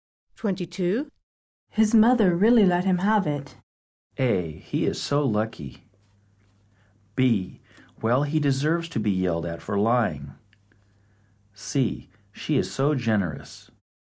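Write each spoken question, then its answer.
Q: His mother really let him have it.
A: B: Well, he deserves to be yelled at for lying.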